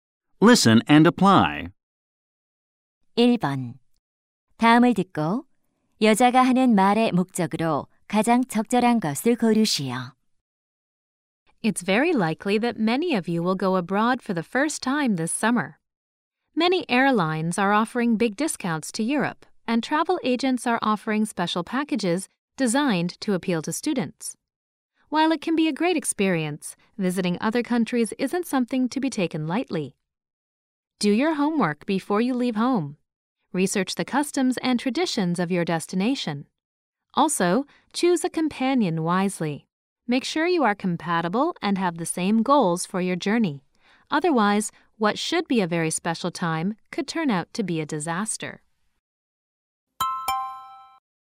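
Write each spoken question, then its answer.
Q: 다음을 듣고 여자가 하는 말의 목적으로 가장 적절한 것을 고르시오.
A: 해외여행 전에 철저히 준비하라고 조언하려고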